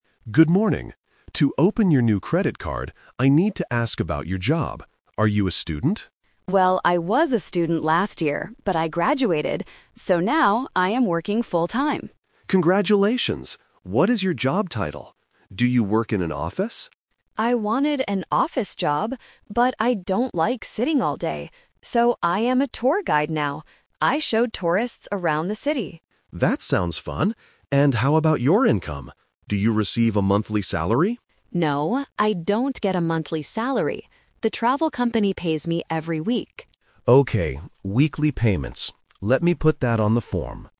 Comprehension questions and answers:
Listen to the conversation at a bank. Circle the correct answer (A, B, or C).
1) What is Nina's job right now?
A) A student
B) An office worker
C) A tour guide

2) Why didn't Nina get an office job?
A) She does not like sitting all day.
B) She is still a university student.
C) She loves working with computers.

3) How does Nina get her income?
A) She gets a monthly salary.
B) She gets paid every week.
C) The tourists give her money directly.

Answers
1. C) A tour guide
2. A) She does not like sitting all day.
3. B) She gets paid every week.

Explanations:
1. Nina clearly says, "...I am a tour guide now." Option (A) is a trap: the clerk asks if she is a student, and she says she was one last year. Option (B) is also a trap: she wanted an office job but didn't get one.
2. Nina explains her choice by saying, "...but I don't like sitting all day." Option (B) is incorrect because she already graduated. Option (C) is a plausible guess for someone in an office, but it is not mentioned in the audio.
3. Nina says, "The travel company pays me every week." Option (A) is the trap: the bank clerk asks if she gets a monthly salary, but she says "No". Option (C) is a trap using the word "tourists" from the audio, but they are not the ones who pay her salary.

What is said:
Bank Clerk: Good morning. To open your new credit card, I need to ask about your job. Are you a student?
Nina: Well, I was a student last year, but I graduated. So now, I am working full-time.
Bank Clerk: Congratulations. What is your job title? Do you work in an office?
Nina: I wanted an office job, but I don't like sitting all day. So, I am a tour guide now. I show tourists around the city.
Bank Clerk: That sounds fun. And how about your income? Do you receive a monthly salary?
Nina: No, I don't get a monthly salary. The travel company pays me every week.

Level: A2

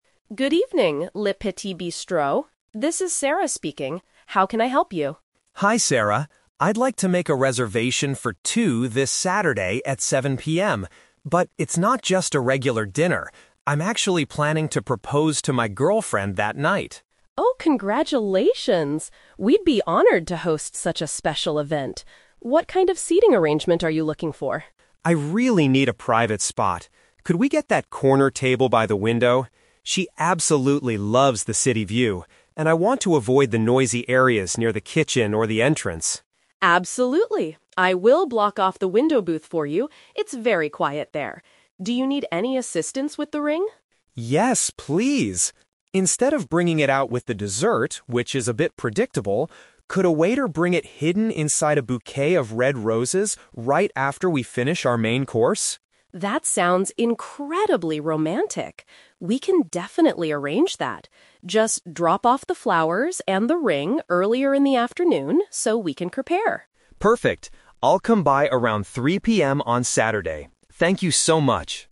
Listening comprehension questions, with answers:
Listen to a phone conversation between a customer and a restaurant manager. Choose the best answer (A, B, or C) for each question.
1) Why does the man want to reserve a specific table?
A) He wants to be close to the kitchen for faster service.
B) He wishes to have a peaceful area with a nice scenery.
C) He needs a large space to accommodate his family members.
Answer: B) He wishes to have a peaceful area with a nice scenery.

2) How does the man want to present the engagement ring?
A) By hiding it inside a sweet dish at the end of the meal.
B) By putting it at the bottom of his girlfriend's wine glass.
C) By having a staff member deliver it within some flowers.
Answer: C) By having a staff member deliver it within some flowers.

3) What is the man's plan for Saturday afternoon?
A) To bring the necessary items to the restaurant in advance.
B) To have a formal meeting with the restaurant manager.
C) To pick up his girlfriend from her workplace.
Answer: A) To bring the necessary items to the restaurant in advance.

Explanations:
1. The customer requests a "private spot" (peaceful area) because he wants to "avoid the noisy areas". He also mentions his girlfriend loves the "city view" (nice scenery).
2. The customer asks if a "waiter" (staff member) could bring the ring "hidden inside a bouquet of red roses" (within some flowers).
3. The manager tells him to "drop off the flowers and the ring earlier in the afternoon," and the customer agrees to "come by around 3:00 PM." Paraphrasing: drop off = bring in advance; flowers and ring = necessary items.

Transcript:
Manager: Good evening, Le Petit Bistro. This is Sarah speaking. How can I help you?
Customer: Hi Sarah, I'd like to make a reservation for two this Saturday at 7:00 PM. But it's not just a regular dinner. I'm actually planning to propose to my girlfriend that night.
Manager: Oh, congratulations! We'd be honored to host such a special event. What kind of seating arrangement are you looking for?
Customer: I really need a private spot. Could we get that corner table by the window? She absolutely loves the city view, and I want to avoid the noisy areas near the kitchen or the entrance.
Manager: Absolutely, I will block off the window booth for you. It's very quiet there. Do you need any assistance with the ring?
Customer: Yes, please! Instead of bringing it out with the dessert, which is a bit predictable, could a waiter bring it hidden inside a bouquet of red roses right after we finish our main course?
Manager: That sounds incredibly romantic. We can definitely arrange that. Just drop off the flowers and the ring earlier in the afternoon so we can prepare.

